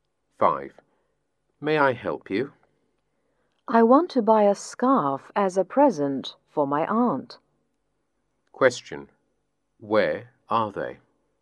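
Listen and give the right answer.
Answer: In a shop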